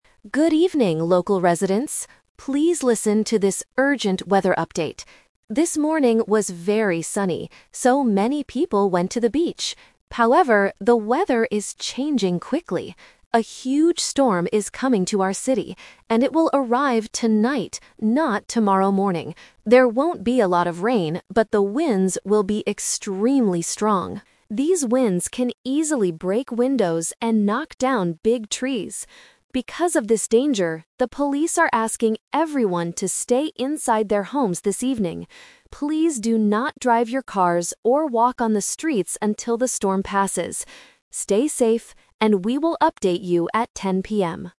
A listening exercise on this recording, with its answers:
Listen to the news report and circle the correct answer (A, B, or C).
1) When will the storm arrive in the city?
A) This morning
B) Tonight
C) Tomorrow morning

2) What is the main danger of this storm?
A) Heavy rain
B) Strong winds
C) Big snow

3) What does the news anchor tell people to do?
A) Stay inside their houses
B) Drive out of the city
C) Go to the beach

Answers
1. B) Tonight
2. B) Strong winds
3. A) Stay inside their houses

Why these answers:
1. This is "The Twist". The anchor says the storm will arrive "tonight, not tomorrow morning" (Option C - Trap). Option (A) is a trap because this morning was "very sunny".
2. The anchor explicitly states, "There won't be a lot of rain (Option A - Trap), but the winds will be extremely strong. These winds can easily break windows and knock down big trees." Option (C) is not mentioned.
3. The anchor says, "the police are asking everyone to stay inside their homes this evening." Option (B) is a trap because the anchor specifically warns, "Please do not drive your cars". Option (C) is what people did this morning, not what they should do now.

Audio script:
News Anchor: Good evening, local residents. Please listen to this urgent weather update. This morning was very sunny, so many people went to the beach. However, the weather is changing quickly. A huge storm is coming to our city, and it will arrive tonight, not tomorrow morning. There won't be a lot of rain, but the winds will be extremely strong. These winds can easily break windows and knock down big trees. Because of this danger, the police are asking everyone to stay inside their homes this evening. Please do not drive your cars or walk on the streets until the storm passes. Stay safe, and we will update you at 10 PM.

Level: A2

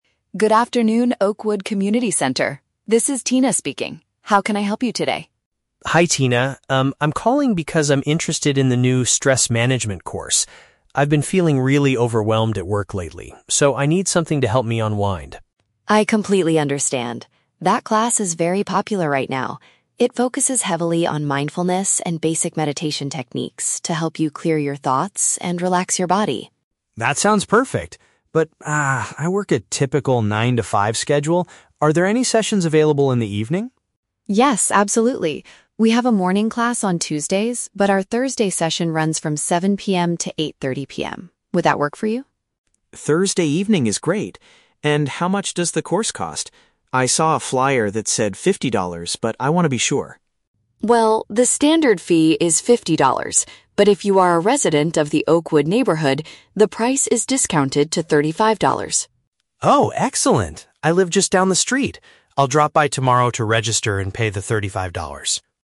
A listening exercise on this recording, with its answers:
Listen to the phone conversation between a customer and a community center receptionist, and choose the correct answer (A, B, or C).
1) Why does Mark want to join the Stress Management course?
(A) He wants to learn how to teach basic meditation techniques.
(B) He needs a way to relax because of heavy pressure at his job.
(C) He was told by his manager to attend a mindfulness session.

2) Which class schedule does Mark decide to take?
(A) The session that takes place on Thursday night.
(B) The class that begins on Tuesday morning.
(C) The special weekend workshop for office workers.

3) Why will Mark only pay $35 for the course?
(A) Because he has a special discount coupon from a flyer.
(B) Because he is taking the class for the second time.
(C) Because his house is located in the local area.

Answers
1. (B) He needs a way to relax because of heavy pressure at his job.
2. (A) The session that takes place on Thursday night.
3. (C) Because his house is located in the local area.

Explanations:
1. Mark says he has been feeling "really overwhelmed at work," which means he is under heavy pressure. He also says he needs something to help him "unwind," which is a synonym for relax.
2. Mark works a "nine-to-five schedule" so he needs an evening class. He agrees that the "Thursday session [from] 7:00 PM to 8:30 PM" is great. "Thursday night" is a paraphrase of this time.
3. The receptionist says the price is discounted to $35 if he is a "resident of the Oakwood neighborhood." Mark confirms he lives "just down the street." "Located in the local area" is a paraphrase of being a neighborhood resident.

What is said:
Receptionist: Good afternoon, Oakwood Community Center. This is Tina speaking. How can I help you today?
Mark: Hi Tina. Um, I'm calling because I'm interested in the new Stress Management course. I've been feeling really overwhelmed at work lately, so I need something to help me unwind.
Receptionist: I completely understand. That class is very popular right now. It focuses heavily on mindfulness and basic meditation techniques to help you clear your thoughts and relax your body.
Mark: That sounds perfect. But, ah, I work a typical nine-to-five schedule. Are there any sessions available in the evening?
Receptionist: Yes, absolutely. We have a morning class on Tuesdays, but our Thursday session runs from 7:00 PM to 8:30 PM. Would that work for you?
Mark: Thursday evening is great. And how much does the course cost? I saw a flyer that said $50, but I want to be sure.
Receptionist: Well, the standard fee is $50, but if you are a resident of the Oakwood neighborhood, the price is discounted to $35.
Mark: Oh, excellent! I live just down the street. I'll drop by tomorrow to register and pay the thirty-five dollars

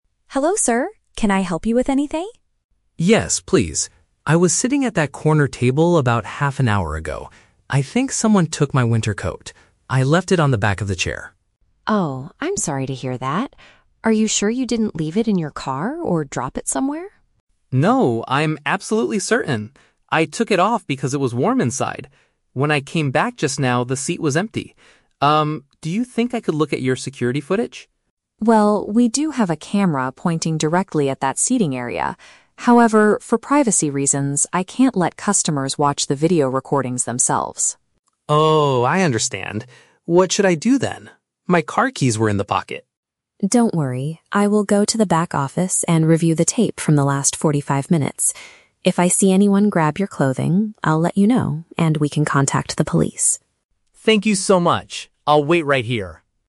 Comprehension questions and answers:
Listen to the conversation between a customer and a store manager. Choose the correct answer (A, B, or C) for each question.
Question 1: Why is the customer talking to the manager?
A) He lost his car keys in the parking lot.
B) His jacket disappeared from the seating area.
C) He wants to buy a new winter coat.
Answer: B) His jacket disappeared from the seating area.

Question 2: What is the store's rule about the security cameras?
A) The cameras do not film the corner tables.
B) Only the police are allowed to review the tapes.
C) Guests are not permitted to view the digital files.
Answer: C) Guests are not permitted to view the digital files.

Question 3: What does the manager promise to do?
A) Watch the footage himself in another room.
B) Call the police immediately to report the crime.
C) Help the customer search the entire store.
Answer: A) Watch the footage himself in another room.

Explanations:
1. The Key: The customer says, "someone took my winter coat. I left it on the back of the chair." A winter coat is a jacket, and a chair is in the seating area. The Trap (A): The customer mentions his "car keys" later, but they were in the pocket of the coat. He didn't lose them in the parking lot. Plausible but not mentioned (C): He is at a store, so buying a coat is a logical action, but he is there to report a missing item, not to shop.
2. The Key: The manager says, "I can't let customers watch the video recordings themselves." Customers are guests, and video recordings are digital files. The Trap (A): The manager explicitly says they do have a camera "pointing directly at that seating area" (the corner table). The Trap (B): The police are mentioned at the end of the audio, but the manager himself will review the tapes, so it's not only for the police.
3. The Key: The manager says, "I will go to the back office and review the tape". The back office is another room, and reviewing the tape means watching the footage. The Trap (B): The manager says they will contact the police if he sees someone take the clothing on the tape. He does not call them immediately. Plausible but not mentioned (C): Helping the customer search the store is a nice thing to do, but the manager only promises to check the video.

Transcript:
Manager: Hello, sir. Can I help you with anything?
Customer: Yes, please. I was sitting at that corner table about half an hour ago. I think someone took my winter coat. I left it on the back of the chair.
Manager: Oh, I'm sorry to hear that. Are you sure you didn't leave it in your car or drop it somewhere?
Customer: No, I'm absolutely certain. I took it off because it was warm inside. When I came back just now, the seat was empty. Um, do you think I could look at your security footage?
Manager: Well, we do have a camera pointing directly at that seating area. However, for privacy reasons, I can't let customers watch the video recordings themselves.
Customer: Oh, I understand. What should I do then? My car keys were in the pocket!
Manager: Don't worry. I will go to the back office and review the tape from the last forty-five minutes. If I see anyone grab your clothing, I'll let you know, and we can contact the police.

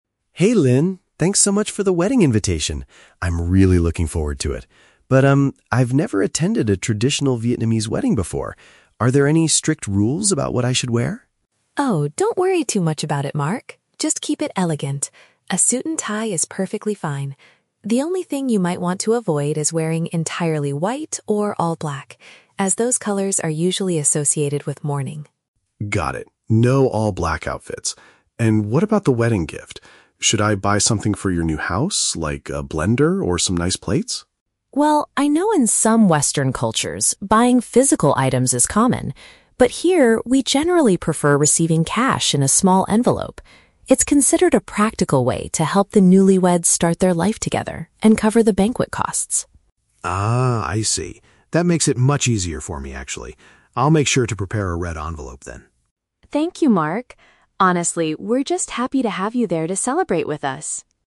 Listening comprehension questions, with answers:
Listen to the conversation between two colleagues. Choose the correct answer (A, B, or C) for each question.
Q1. What clothing advice does Linh give to Mark?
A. He should wear a traditional local costume to the party.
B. He should stay away from colors linked to funerals.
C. He must wear an entirely white suit to look elegant.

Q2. Why is giving money preferred over physical gifts at this wedding?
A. It assists the couple in paying for the wedding feast and their future.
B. The couple has already purchased all the kitchen appliances they need.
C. It is the only acceptable way to reserve a seat at the restaurant.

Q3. What will Mark most likely do next to prepare for the event?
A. He will buy a set of nice plates for the couple's new house.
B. He will place some money inside a colored paper packet.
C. He will ask other colleagues about where to buy a black suit.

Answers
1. B. He should stay away from colors linked to funerals.
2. A. It assists the couple in paying for the wedding feast and their future.
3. B. He will place some money inside a colored paper packet.

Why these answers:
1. Linh tells Mark to avoid all white or all black because they are "associated with mourning" (linked to funerals / sadness over a death). Option (C) is a trap; she mentions "entirely white" but says he should avoid it, not wear it. Option (A) is a plausible guess for a traditional wedding, but she explicitly says a regular "suit and tie" is fine.
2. Linh explains that cash helps the newlyweds "start their life together" (their future) and "cover the banquet costs" (pay for the wedding feast). Option (B) is a trap; Mark mentions a "blender" and "plates" (kitchen appliances), but Linh never says they already have them, she just says cash is preferred. Option (C) is never mentioned.
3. Mark says he will "prepare a red envelope", which implies putting cash inside a colored paper packet. Option (A) is a trap; he asked if he should buy plates, but decided against it after Linh's explanation. Option (C) is a trap because he specifically noted "no all-black outfits".

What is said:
Mark: Hey Linh, thanks so much for the wedding invitation! I'm really looking forward to it. But, um, I've never attended a traditional Vietnamese wedding before. Are there any strict rules about what I should wear?
Linh: Oh, don't worry too much about it, Mark! Just keep it elegant. A suit and tie is perfectly fine. The only thing you might want to avoid is wearing entirely white or all black, as those colors are usually associated with mourning.
Mark: Got it, no all-black outfits. And what about the wedding gift? Should I buy something for your new house, like a blender or some nice plates?
Linh: Well, I know in some Western cultures, buying physical items is common. But here, we generally prefer receiving cash in a small envelope. It's considered a practical way to help the newlyweds start their life together and cover the banquet costs.
Mark: Ah, I see! That makes it much easier for me, actually. I'll make sure to prepare a red envelope then.

